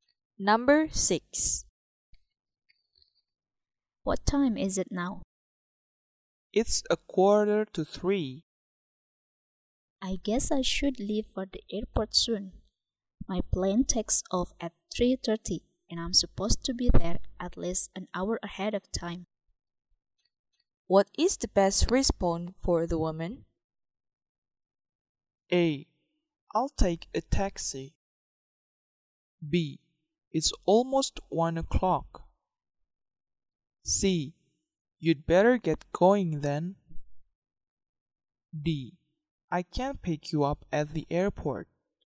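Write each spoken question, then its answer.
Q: What is the best response for the woman?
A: C: You'd better get going then.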